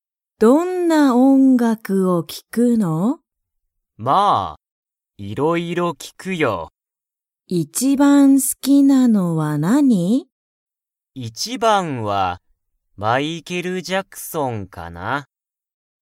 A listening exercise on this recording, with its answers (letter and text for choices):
Comprehension Quiz (Skip if you don't understand the conversation yet)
しょうたは、いろいろな____を聴(き)く。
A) 音楽(おんがく)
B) 海(うみ)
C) 映画(えいが)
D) ラジオ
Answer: A) 音楽(おんがく)

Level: Level 1